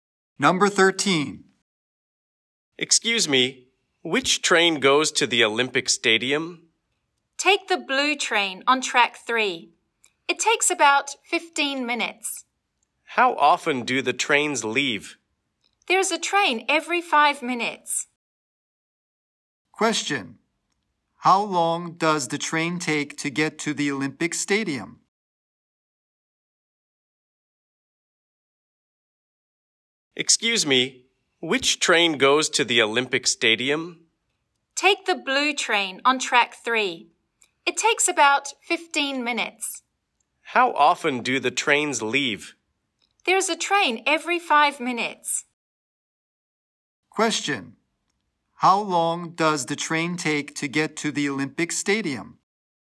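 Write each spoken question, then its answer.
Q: How long does the train take to get to the Olympic Stadium?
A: About 15 minutes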